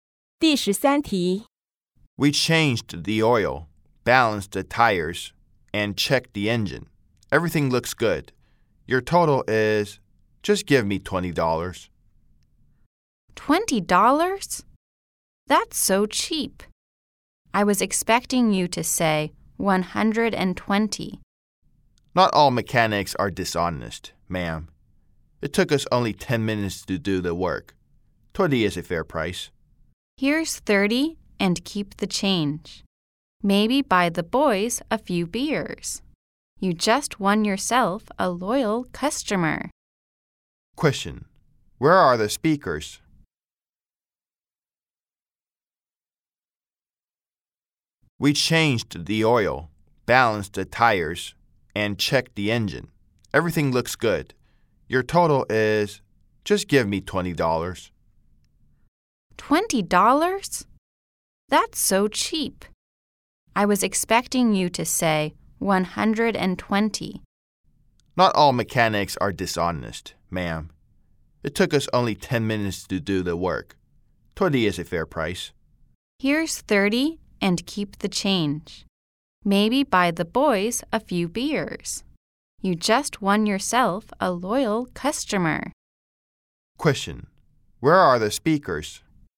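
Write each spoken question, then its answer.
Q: Question: Where are the speakers?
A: At a car repair shop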